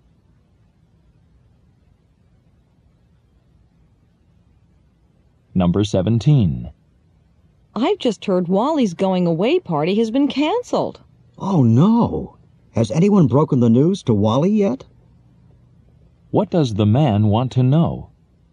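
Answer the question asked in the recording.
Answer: Whether Wally has been told the party is canceled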